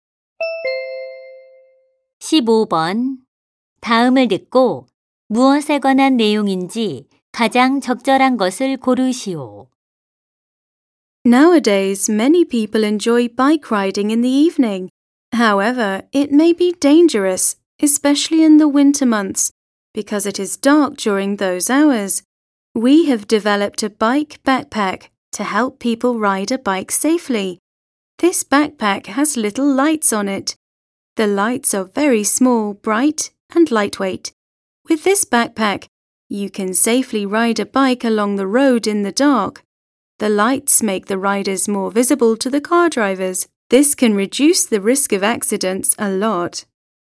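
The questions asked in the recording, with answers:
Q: 다음을 듣고 무엇에 관한 내용인지 가장 적절한 것을 고르시오.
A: 조명이 달린 자전거용 배낭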